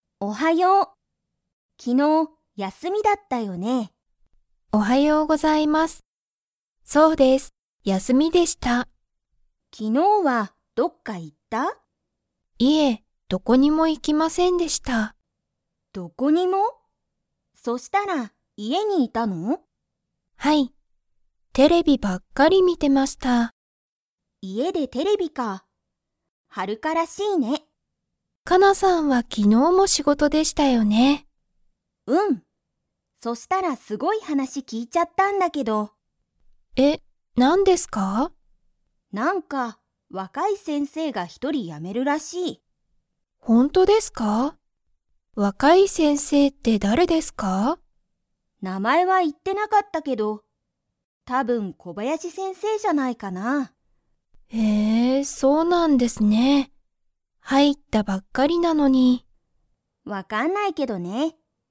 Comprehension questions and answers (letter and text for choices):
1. はるかは、昨日(きのう)どこかへ行(い)きましたか?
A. はい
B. いいえ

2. ____が一人(ひとり)やめるらしい。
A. 若(わか)い先生(せんせい)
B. テレビの人(ひと)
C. はるかの家族(かぞく)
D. かなの友達(ともだち)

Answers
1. B. いいえ
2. A. 若(わか)い先生(せんせい)

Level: Level 2